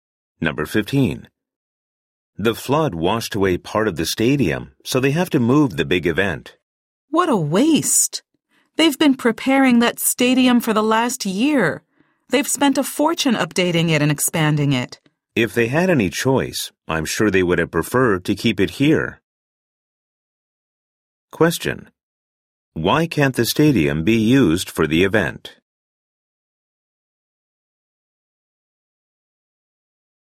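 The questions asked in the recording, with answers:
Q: Why can't the stadium be used for the event?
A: A flood washed away part of it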